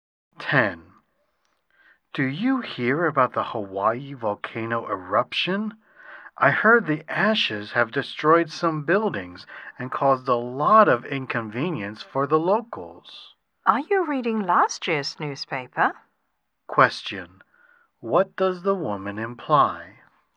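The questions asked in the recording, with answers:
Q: What does the woman imply?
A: The news is old.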